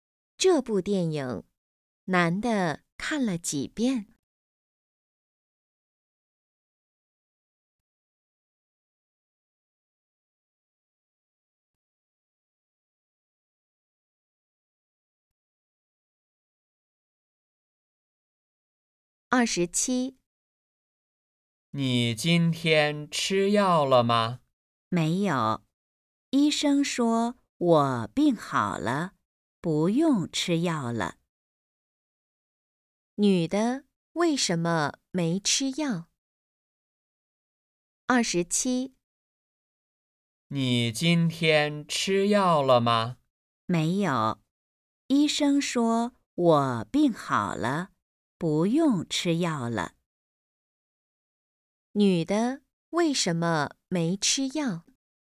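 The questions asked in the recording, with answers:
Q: 女的为什么没吃药?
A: 病好了,不用吃药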